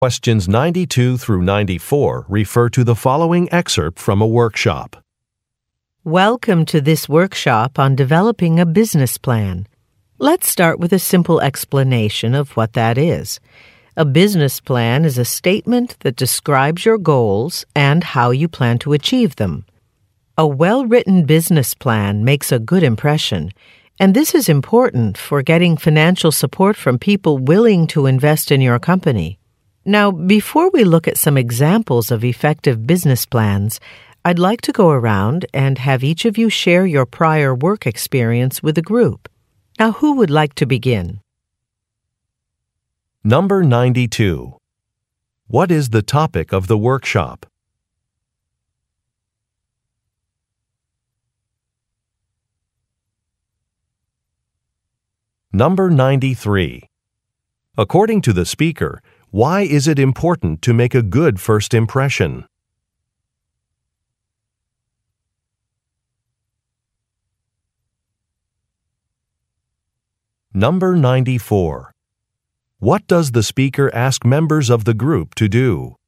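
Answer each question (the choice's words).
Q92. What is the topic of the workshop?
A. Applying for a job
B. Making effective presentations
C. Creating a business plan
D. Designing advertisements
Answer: Creating a business plan

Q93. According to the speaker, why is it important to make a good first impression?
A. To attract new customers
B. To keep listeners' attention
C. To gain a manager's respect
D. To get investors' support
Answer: To get investors' support

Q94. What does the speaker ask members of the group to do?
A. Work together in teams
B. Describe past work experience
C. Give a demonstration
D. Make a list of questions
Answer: Describe past work experience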